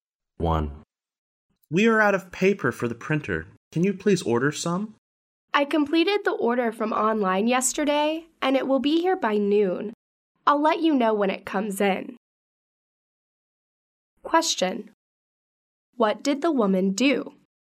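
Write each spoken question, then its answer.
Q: What did the woman do?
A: She ordered printer paper online yesterday.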